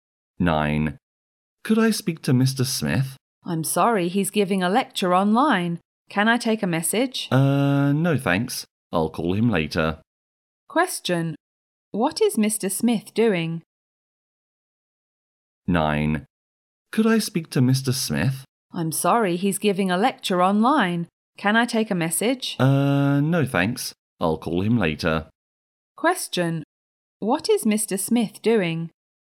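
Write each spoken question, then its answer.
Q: What is Mr. Smith doing?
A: Giving a lecture online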